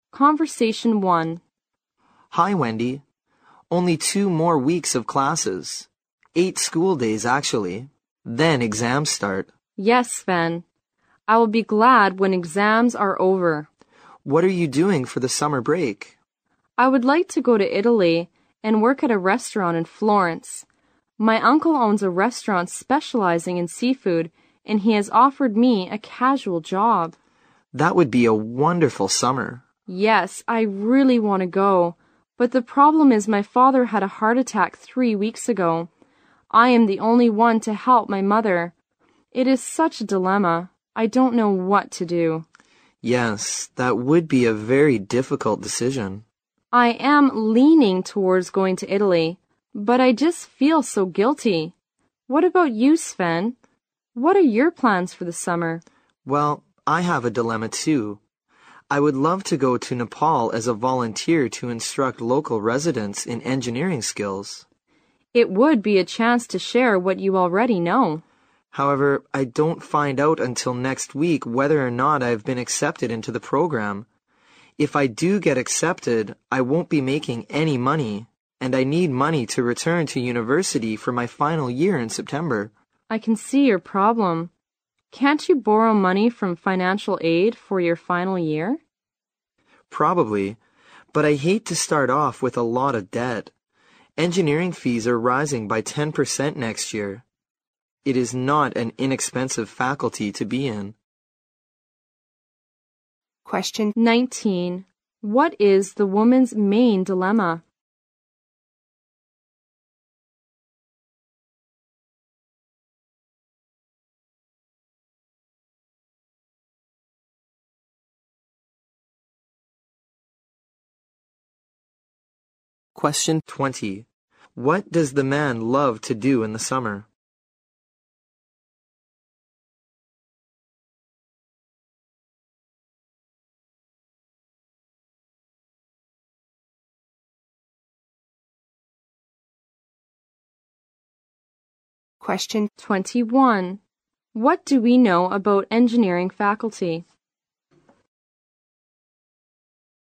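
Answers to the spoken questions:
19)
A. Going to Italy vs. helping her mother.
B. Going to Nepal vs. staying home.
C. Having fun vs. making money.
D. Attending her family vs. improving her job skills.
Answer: A. Going to Italy vs. helping her mother.
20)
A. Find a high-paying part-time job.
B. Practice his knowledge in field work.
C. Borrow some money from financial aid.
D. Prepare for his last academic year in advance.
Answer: B. Practice his knowledge in field work.
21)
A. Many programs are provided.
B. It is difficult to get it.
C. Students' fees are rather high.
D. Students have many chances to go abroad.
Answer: C. Students' fees are rather high.

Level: 六级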